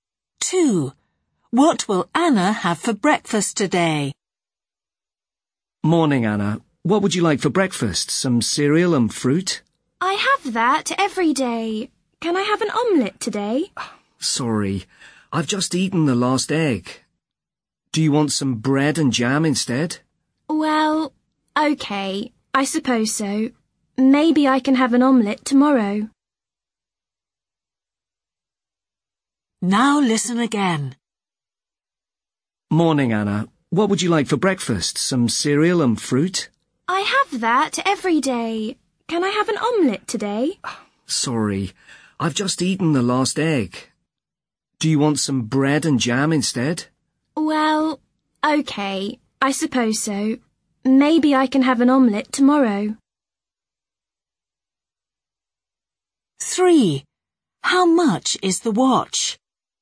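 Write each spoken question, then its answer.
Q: What will Anna have for breakfast today?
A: bread and jam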